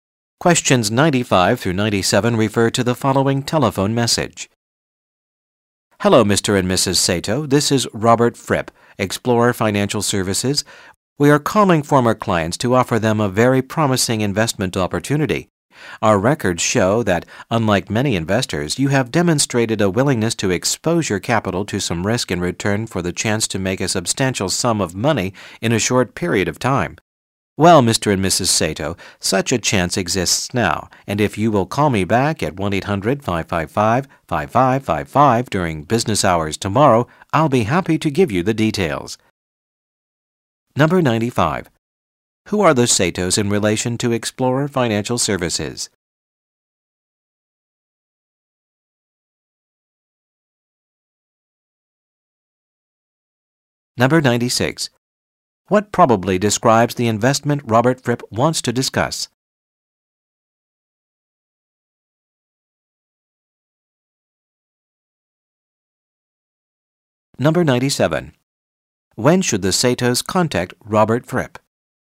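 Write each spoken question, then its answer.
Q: Who are the Satos in relation to Explorer Financial Services?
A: Former clients

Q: When should the Satos contact Robert Fripp?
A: During business hours tomorrow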